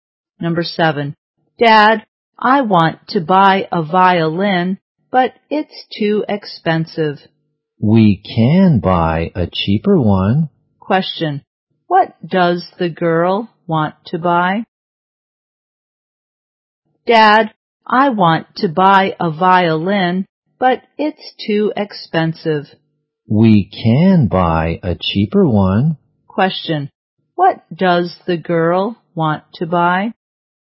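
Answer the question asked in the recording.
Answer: A violin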